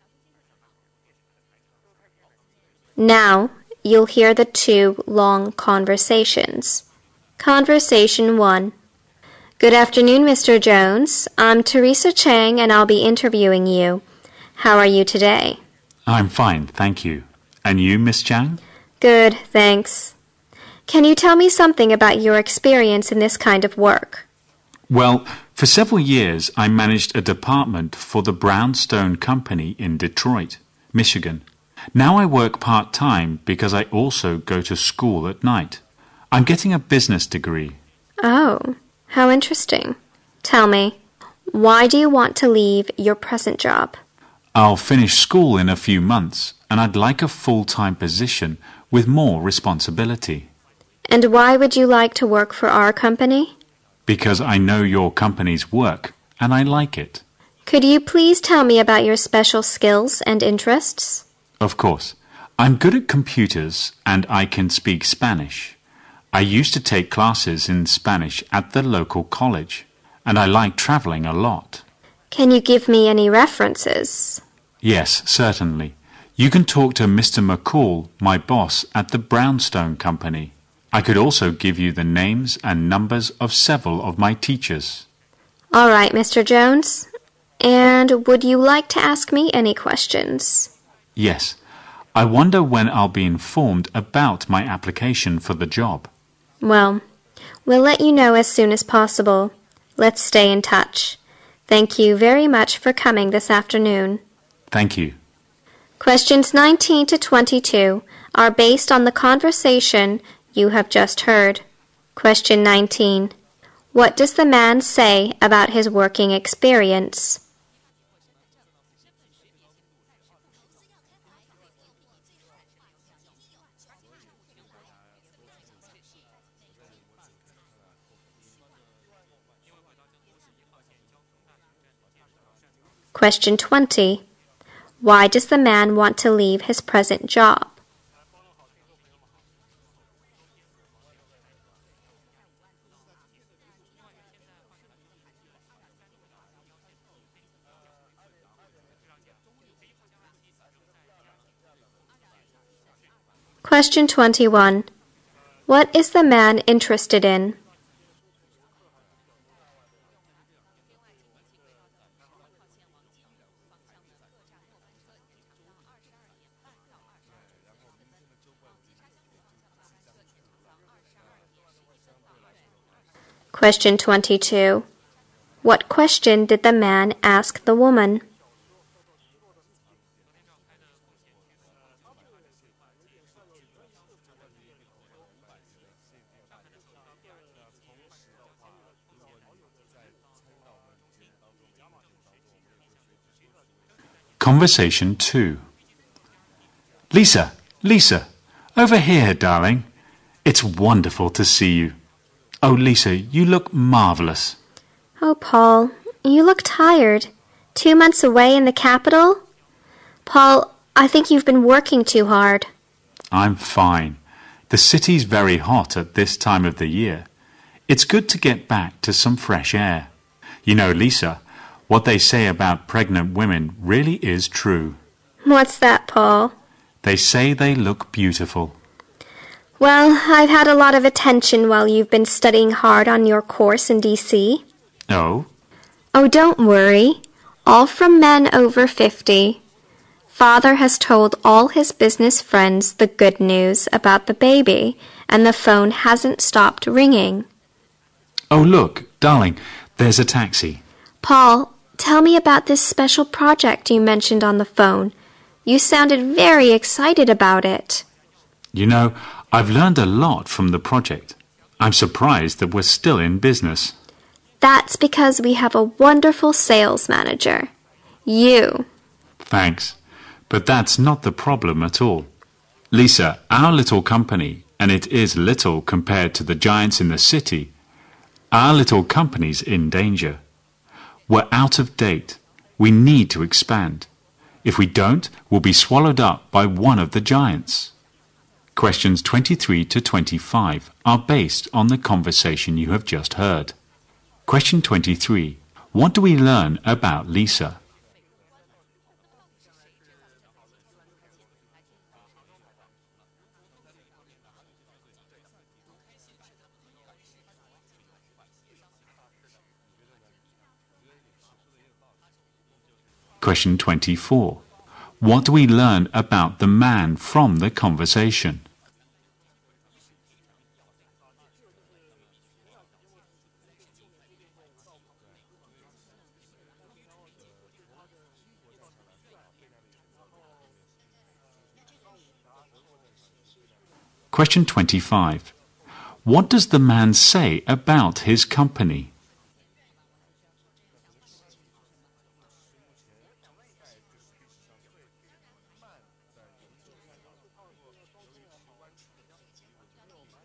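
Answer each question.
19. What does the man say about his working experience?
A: He managed a department for the Brownstone Company for several years.

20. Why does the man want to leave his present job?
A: He wants a full-time position with more responsibility.

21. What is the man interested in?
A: Traveling.

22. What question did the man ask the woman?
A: When he would be informed about his application.

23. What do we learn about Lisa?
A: She is pregnant.

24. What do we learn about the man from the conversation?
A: He has been studying on a course in the capital for two months.

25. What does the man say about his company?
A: It is out of date, in danger and needs to expand.

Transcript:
How are you today?
M: I am fine, thank you. And you, Miss Chen?
W: Good, Thanks. Can you tell me something about your experience in this kind of work?
M: Well, for several years, I managed a department for the Brownstone Company in Detroit, Michigan. 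Now I work part time because I also go to school at night. I'm getting a business degree.
W: Oh, how interesting. Tell me, why do you want to leave your present job?
M: I'll finish school in a few months, and I'd like a full-time position with more responsibility.
W: And why would you like to work for our company?
M: Because I know your company's work and I like it.
W: Could you please tell me about your special skills and interests?
M: Of course, I'm good at computers and I can speak Spanish. I used to take classes in Spanish at the local college. And I like travelling a lot.
W: Can you give me any references?
M: Yes, certainly. You can talk to Mr. McCaw, my boss, at the Brownstone Company. I could also give you the names and numbers of several of my teachers.
W: All right, Mr. Jones, and would you like to ask me any questions?
M: Yes, I wonder when I'll be informed about my application for the job.
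W: Well, we'll let you know as soon as possible. Let's stay in touch. Thank you very much for coming this afternoon.
M: Thank you.
Questions 19-22 are based on the conversation you have just heard.
Questions 23-25 are based on the conversation you have just heard.
M: Lisa, Lisa! Over here, darling! It's wonderful to see you. Oh, Lisa, you look marvelous.
W: Oh, Paul, you look tired. Two months away in the capital? Paul, I think you've been working too hard.
M: I'm fine. The city is very hot this time of the year. It's good to get back to some fresh air. You know, Lisa, what they say about pregnant women really is true.
W: What's that Paul?
M: They say they look beautiful.
W: Well, I had a lot of tension while you've been studying hard on your course in D.C.
M: Oh?
W: Oh, don't worry, all from a man over 50. Father has told all his business friends the good news about the baby. And the phone hasn't stopped ringing.
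M: Oh, look, darling. There's a taxi.
W: Paul, tell me about the special project you mentioned on the phone. You sounded very excited about it!
M: You know, I've learned a lot from the project. I'm surprised that was still in business.
W: That's because we have a wonderful sales manager ——you!
M: Thanks. But that's not the problem at all. Lisa, our little company, and it is little compared to the giants in the city. Our little company's in danger. We are out of date.We need to expand. If we don't, we will be swallowed up by one of the giants.

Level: 英语四级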